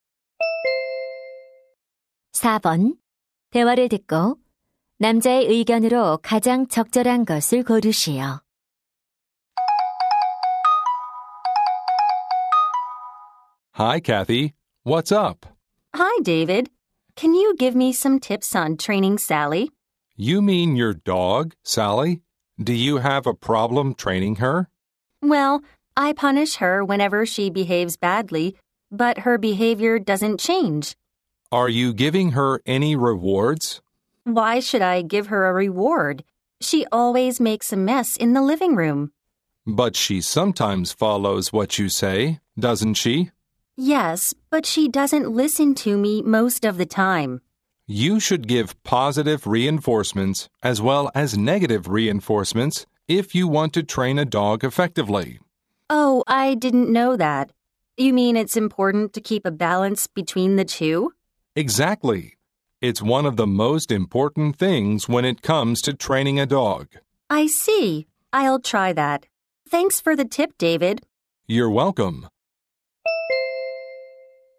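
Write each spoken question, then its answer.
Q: 대화를 듣고 남자의 의견으로 가장 적절한 것을 고르시오.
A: 개를 효과적으로 훈련하려면 처벌과 보상을 균형 있게 주어야 한다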